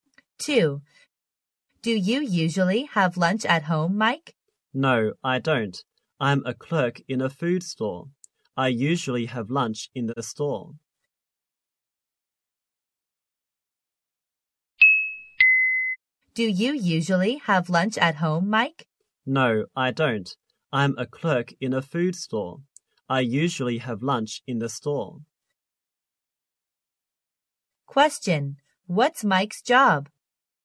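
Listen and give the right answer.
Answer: A clerk in a food store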